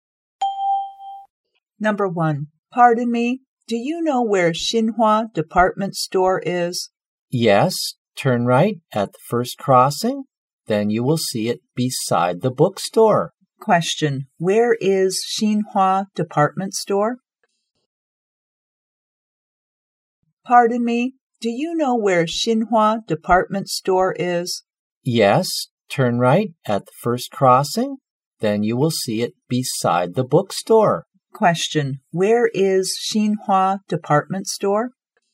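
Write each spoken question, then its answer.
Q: where is Xinhua Department Store?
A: Beside the bookstore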